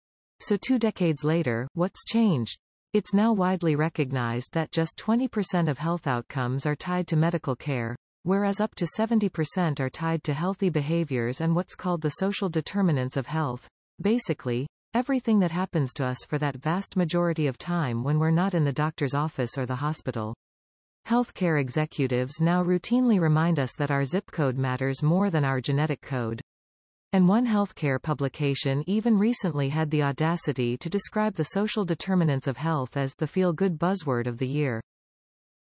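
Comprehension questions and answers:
Sample: You will hear a recording. Type the missing words in each blank.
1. It's now widely recognized that just 20 percent of health ___________ are tied to medical care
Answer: outcomes

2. what's called the social ___________ of health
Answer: determinants

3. everything that happens to us for that vast ___________ of time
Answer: majority

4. Health care ___________ now routinely remind us that our zip code matters more than our genetic code.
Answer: executives

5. And one health care publication even recently had the ___________ to describe the social determinants of health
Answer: audacity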